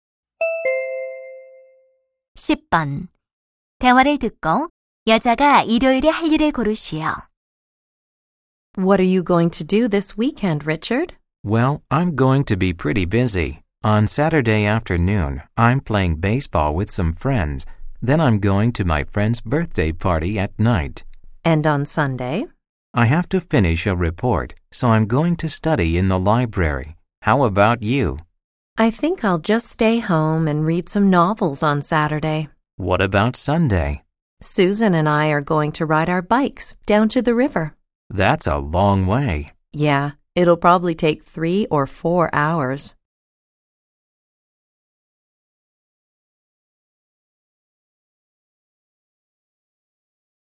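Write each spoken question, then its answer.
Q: 대화를 듣고 여자가 일요일에 할 일을 고르시오.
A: 강까지 자전거 타기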